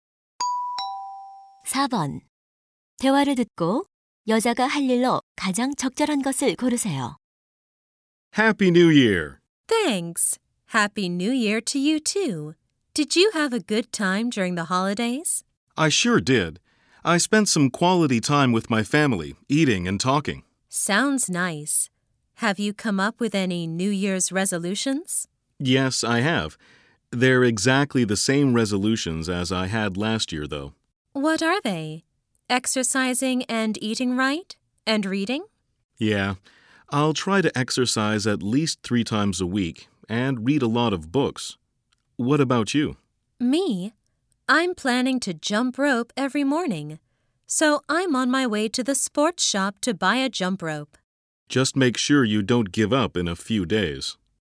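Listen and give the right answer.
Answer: 줄넘기 사러 스포츠용품점에 가기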